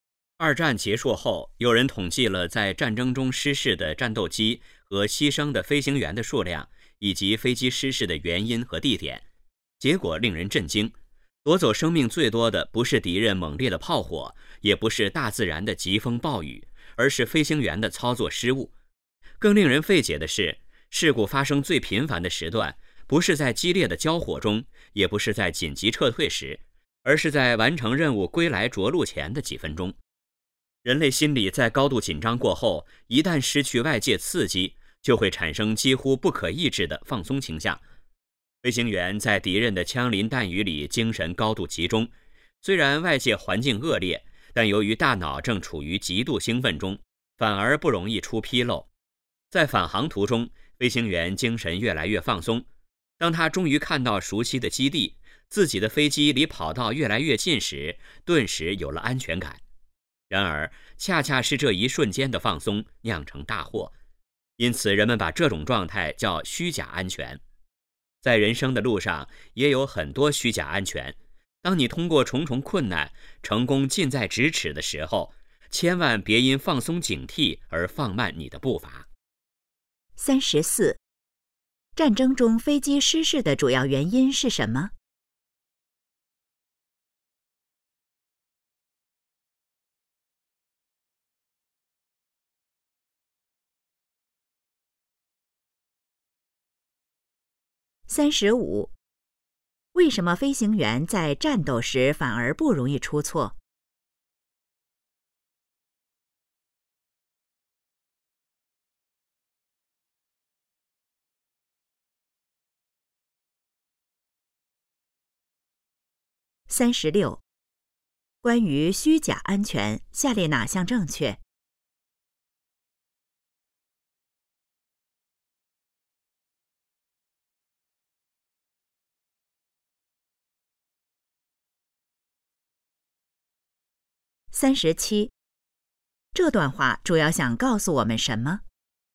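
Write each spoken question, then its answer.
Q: 战争中飞机失事的主要原因是什么?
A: 飞行员的操作失误

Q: 为什么飞行员在战斗时反而不容易出错?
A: 精神高度集中,大脑处于极度兴奋中

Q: 这段话主要想告诉我们什么?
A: 成功近在咫尺时不要放松警惕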